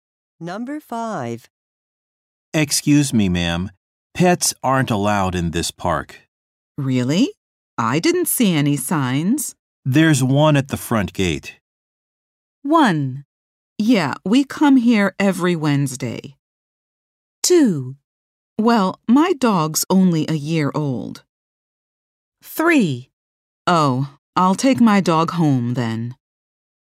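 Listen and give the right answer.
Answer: 3: Oh, I'll take my dog home then.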